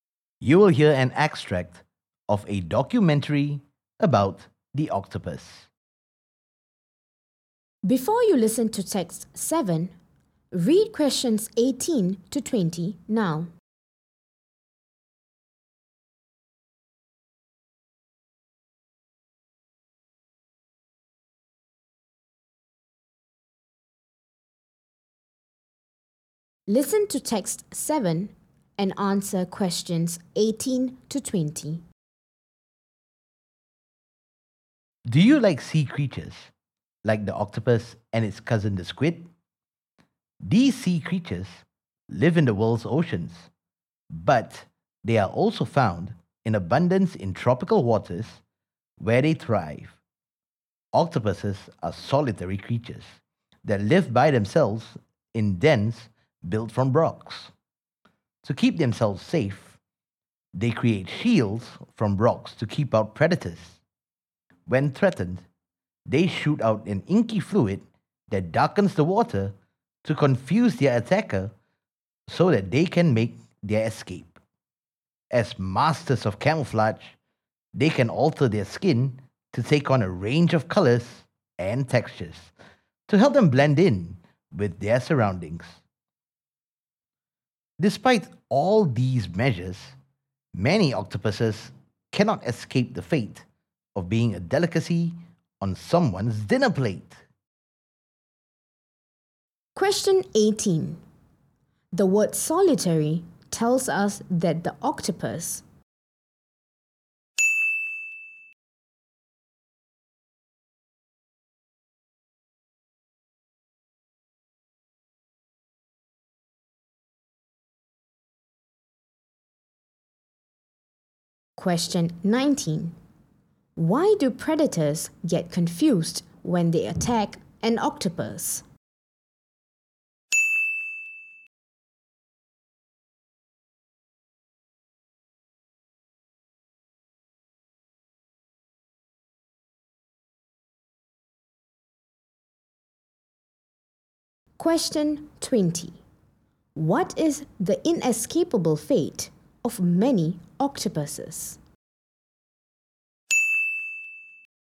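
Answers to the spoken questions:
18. lives by itself
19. It shoots out an inky fluid that darkens the water
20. Being a delicacy on someone's dinner plate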